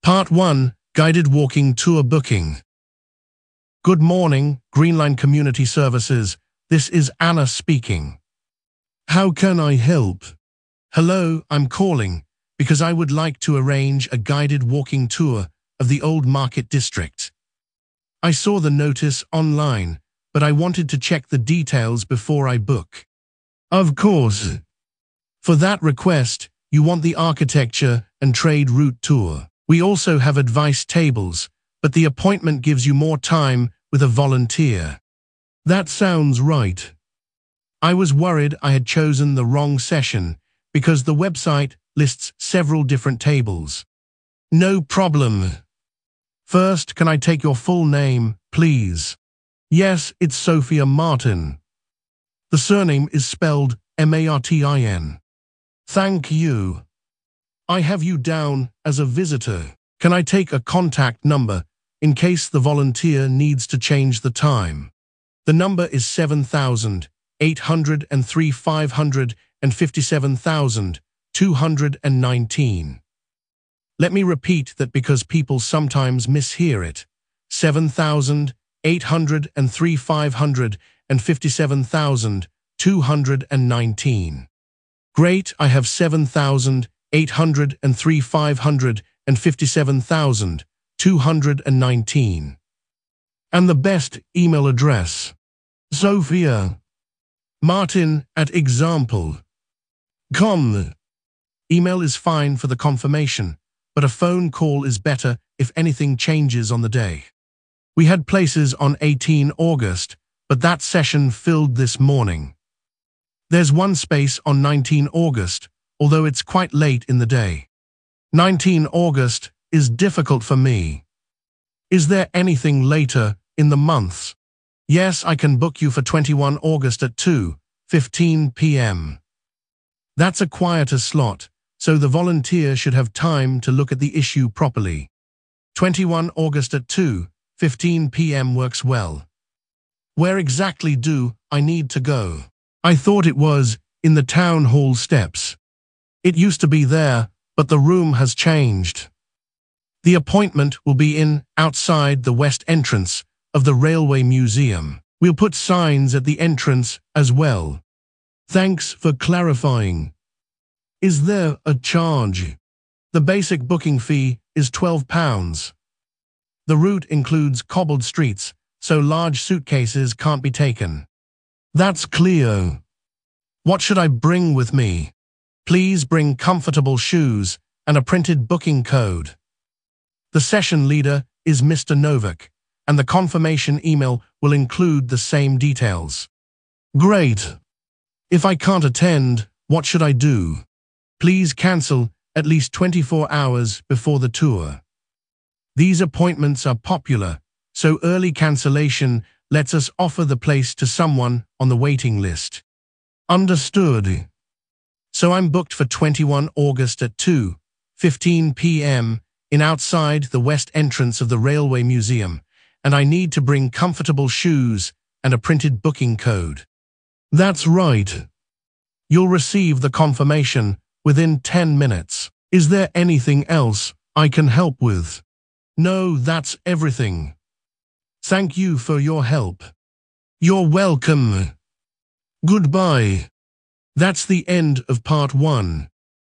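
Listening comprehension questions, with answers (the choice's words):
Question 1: What does the caller want to arrange?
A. a refund appointment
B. guided walking tour of the old market district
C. a library card renewal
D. a lecture ticket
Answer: guided walking tour of the old market district

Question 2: Which table or session does the receptionist recommend?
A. the advice-only table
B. the children's activity desk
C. the architecture and trade route tour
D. the information stand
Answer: the architecture and trade route tour

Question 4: What is the caller's final contact number?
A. 07118 402667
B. 07742 618953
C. 07366 914208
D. 07803 557219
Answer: 07803 557219

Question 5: On what date is the appointment finally booked?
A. 18 August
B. 19 August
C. 21 August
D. the following Monday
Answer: 21 August

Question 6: What time is the appointment?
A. 2:15 pm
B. 9:00 am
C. 12:45 pm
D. 4:30 pm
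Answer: 2:15 pm

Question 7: Where will the appointment take place?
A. the town hall steps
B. outside the west entrance of the railway museum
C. the main library entrance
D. the visitor car park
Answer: outside the west entrance of the railway museum

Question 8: How much is the basic fee?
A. twenty pounds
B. no deposit but parts only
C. twelve pounds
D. one hundred pounds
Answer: twelve pounds

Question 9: What should the caller bring?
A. a passport photo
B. a bank statement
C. a printed map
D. comfortable shoes and a printed booking code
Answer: comfortable shoes and a printed booking code

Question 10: What is the cancellation instruction?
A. send a replacement person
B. cancel at least twenty-four hours before the tour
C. cancel after the appointment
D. wait for the volunteer to call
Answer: cancel at least twenty-four hours before the tour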